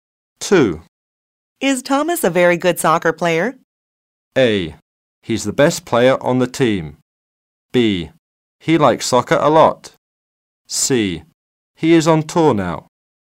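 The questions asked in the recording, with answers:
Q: Is Thomas a very good soccer player?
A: A: He's the best player on the team.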